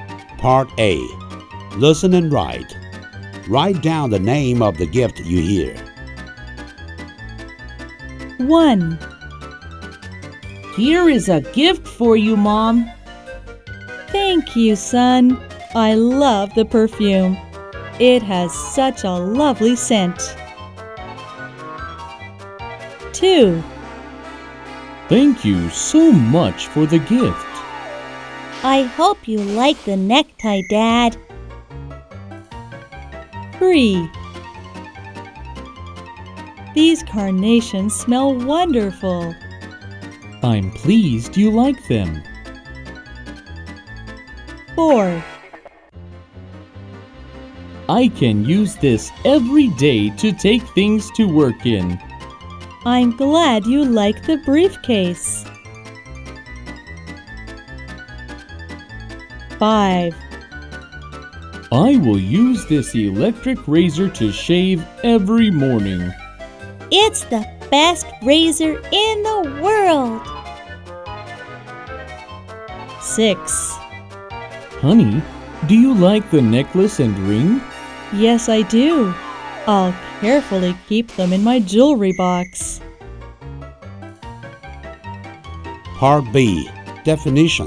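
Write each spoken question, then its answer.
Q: Write down the name of the gift you hear.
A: perfume

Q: Write down the name of the gift you hear.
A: necktie

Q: Write down the name of the gift you hear.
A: carnations

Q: Write down the name of the gift you hear.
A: briefcase

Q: Write down the name of the gift you hear.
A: electric razor

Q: Write down the name of the gift you hear.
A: necklace and ring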